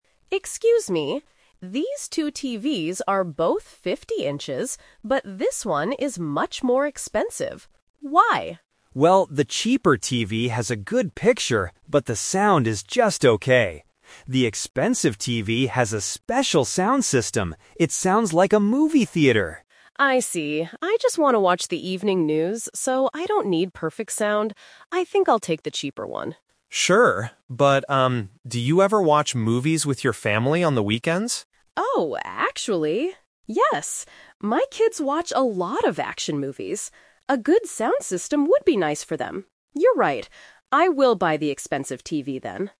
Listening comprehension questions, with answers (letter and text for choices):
Listen to the conversation and choose the correct answer (A, B, or C).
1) What is special about the expensive TV?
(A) It is much bigger.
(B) It has a better sound system.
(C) It comes with free movies.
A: (B) It has a better sound system.

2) Why does the customer want to buy the cheaper TV at first?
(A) She does not have enough money.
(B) She only wants to watch the news.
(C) She does not like action movies.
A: (B) She only wants to watch the news.

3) Which TV does the customer buy in the end?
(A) The cheaper TV, because the sound is okay.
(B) The expensive TV, for her kids to watch movies.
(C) She decides to wait for a sale.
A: (B) The expensive TV, for her kids to watch movies.

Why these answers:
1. The clerk explains that the expensive TV "has a special sound system." Option A is a trap because the customer clearly states at the beginning that "These two TVs are both 50 inches" (they are the same size). Option C is a trap using the word "movies," which is mentioned later, but not as a free gift.
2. The customer initially says, "I just want to watch the evening news, so I don't need perfect sound." Option A is a plausible reason for choosing a cheaper product, but it is not mentioned in the audio. Option C is incorrect; it is her kids who watch action movies.
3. This question uses the "Twist" technique. The customer originally plans to buy the cheaper TV because she only watches the news. However, when the clerk asks about her family, she changes her mind so her kids can enjoy action movies with good sound. Option A is the main trap (her original plan). Option C is not mentioned.

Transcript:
Customer: Excuse me. These two TVs are both 50 inches, but this one is much more expensive. Why?
Clerk: Well, the cheaper TV has a good picture, but the sound is just okay. The expensive TV has a special sound system. It sounds like a movie theater!
Customer: I see. I just want to watch the evening news, so I don't need perfect sound. I think I'll take the cheaper one.
Clerk: Sure. But, um, do you ever watch movies with your family on the weekends?
Customer: Oh, actually... yes. My kids watch a lot of action movies. A good sound system would be nice for them. You're right. I will buy the expensive TV then.